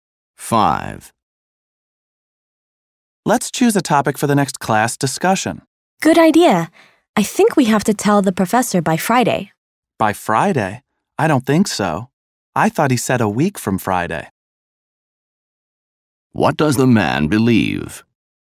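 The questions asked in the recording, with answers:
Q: What does the man believe?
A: The topic is due a week from Friday.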